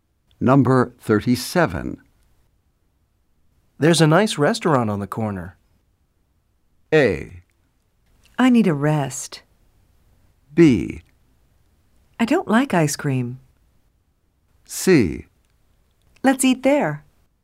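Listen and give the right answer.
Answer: C: Let's eat there.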